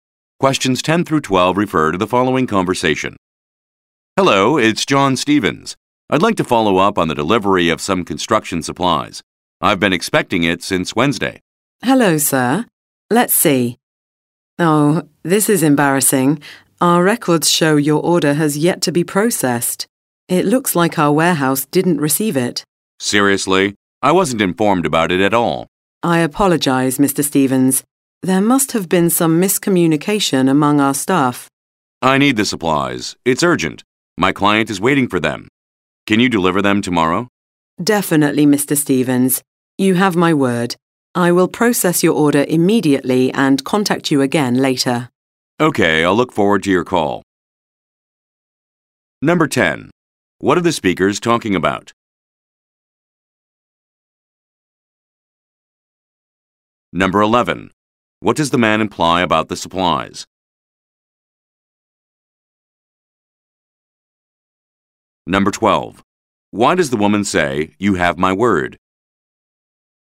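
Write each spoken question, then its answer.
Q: What are the speakers talking about?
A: A delayed delivery of construction supplies that was never processed

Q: What does the man imply about the supplies?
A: He needs them urgently because his client is waiting

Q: Why does the woman say, "You have my word?"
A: To promise that the supplies will be delivered tomorrow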